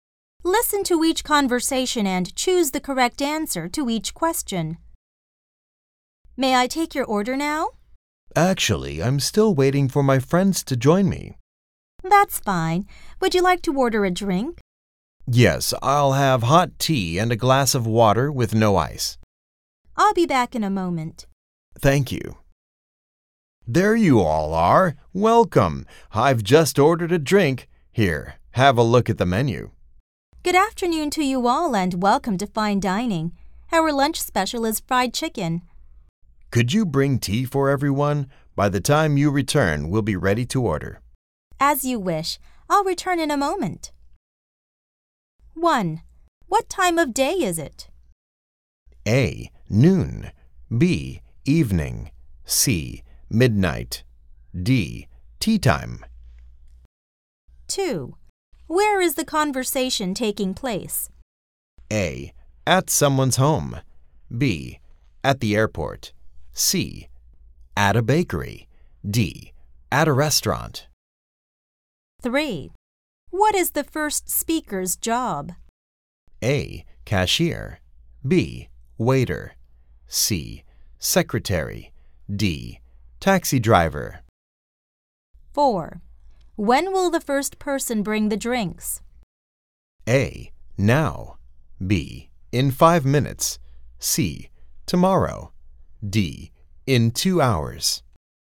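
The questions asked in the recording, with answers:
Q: Where is the conversation taking place?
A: D: At a restaurant.

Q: What is the first speaker's job?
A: B: Waiter.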